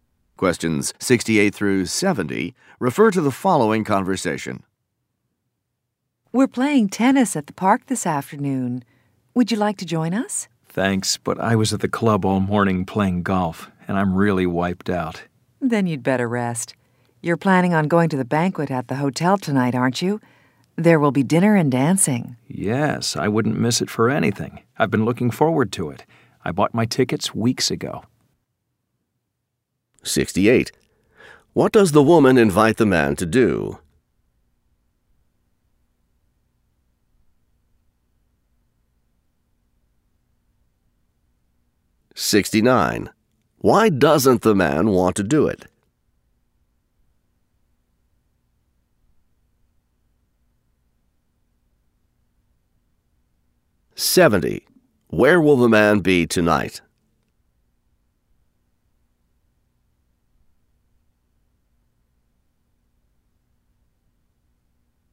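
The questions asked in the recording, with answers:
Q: What does the woman invite the man to do?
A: Play tennis at the park

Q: Why doesn't the man want to do it?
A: He is tired from playing golf all morning

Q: Where will the man be tonight?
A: At the banquet at the hotel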